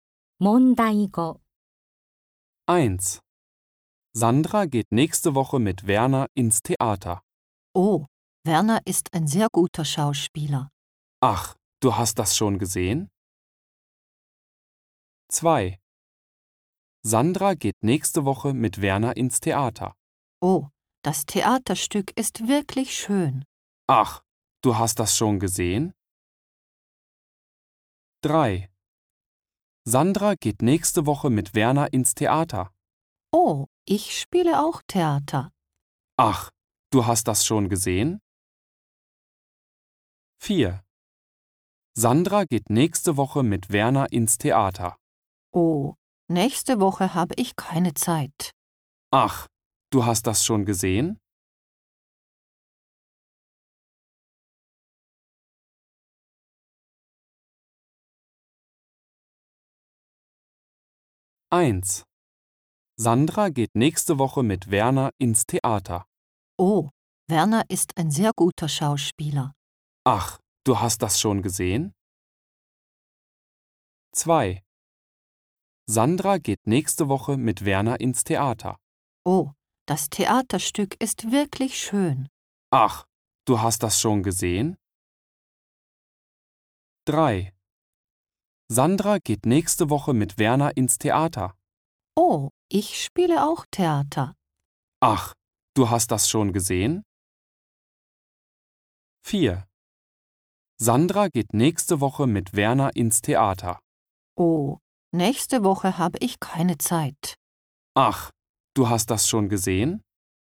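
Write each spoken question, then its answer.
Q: Sandra geht nächste Woche mit Werner ins Theater.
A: 2: Oh, das Theaterstück ist wirklich schön.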